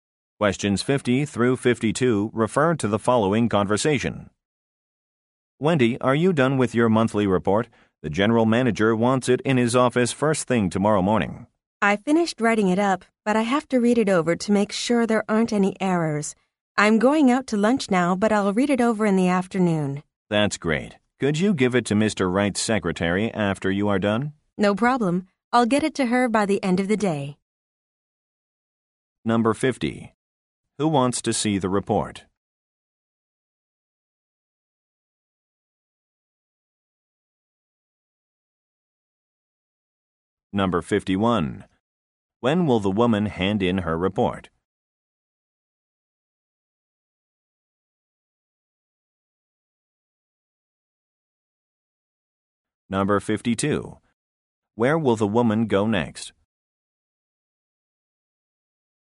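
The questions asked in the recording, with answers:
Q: Who wants to see the report?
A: The general manager

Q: When will the woman hand in her report?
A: By the end of the day

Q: Where will the woman go next?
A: To lunch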